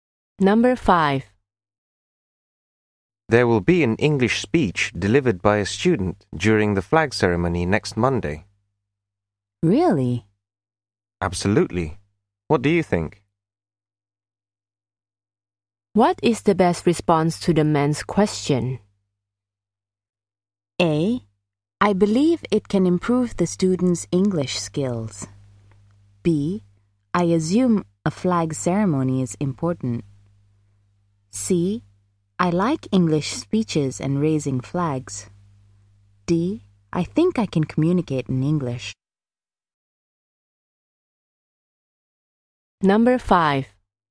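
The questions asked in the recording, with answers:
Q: What is the best response to the man's question?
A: A: I believe it can improve the student's English skills.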